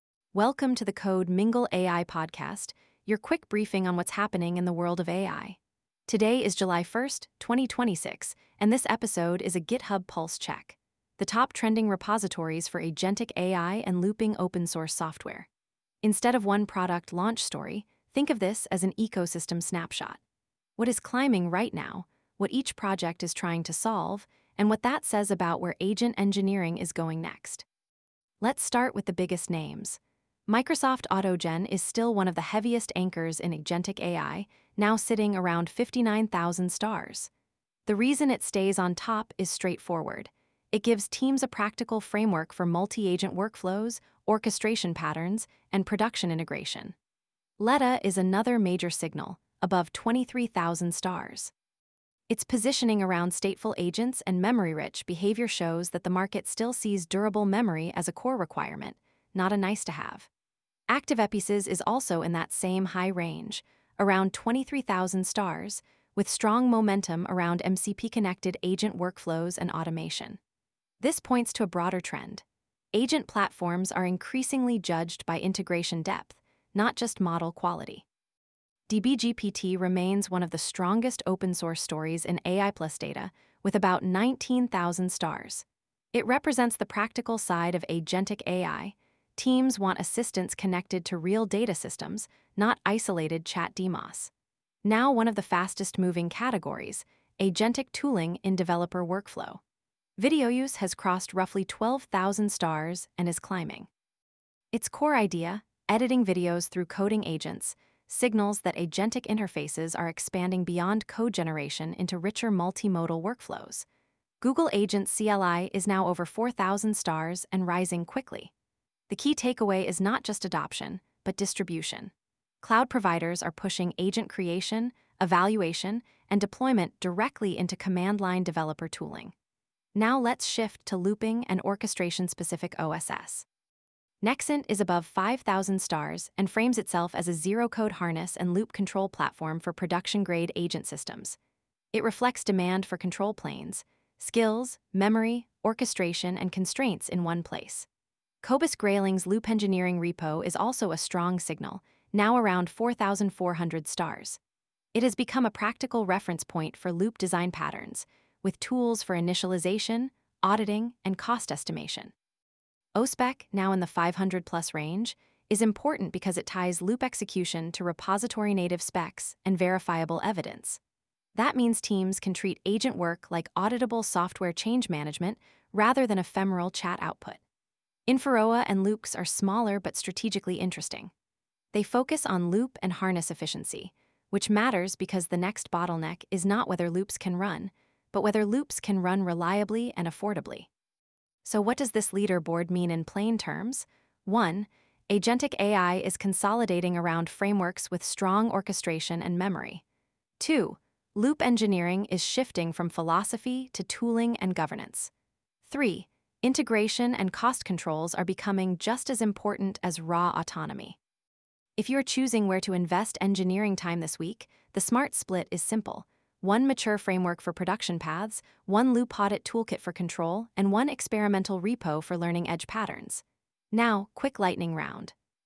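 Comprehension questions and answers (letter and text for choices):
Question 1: What is the core July 1 trend in agentic AI OSS?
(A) Growth of both large frameworks and loop-control infrastructure.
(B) A return to single-prompt chatbots only.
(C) No interest in verification tooling.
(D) Declining use of open source.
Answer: (A) Growth of both large frameworks and loop-control infrastructure.

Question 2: Why are loop-focused repos gaining traction?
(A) Teams need repeatable control, verification, and governance for long-running agents.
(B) They remove the need for tests.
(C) They guarantee zero token spend.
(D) They only serve toy demos.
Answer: (A) Teams need repeatable control, verification, and governance for long-running agents.

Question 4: What does the rise of video-use and agents-cli suggest?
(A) Agentic workflows are becoming multimodal and CLI-native.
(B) Agents are moving away from developer tooling.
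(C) Only browser chat interfaces matter now.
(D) Multimodal workflows are fading.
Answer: (A) Agentic workflows are becoming multimodal and CLI-native.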